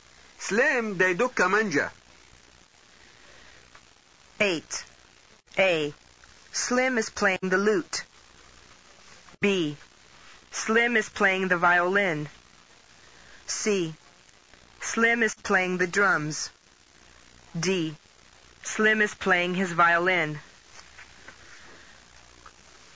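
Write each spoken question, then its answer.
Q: ثمانية. سليم ديدوك كمانجا.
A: B: Slim is playing the violin.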